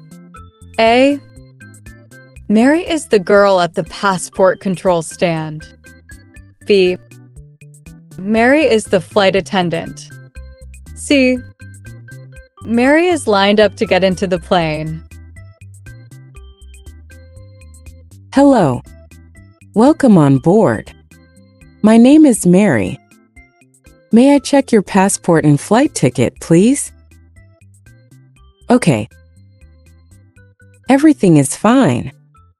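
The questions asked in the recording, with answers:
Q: Conversation C.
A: B: Mary is the flight attendant.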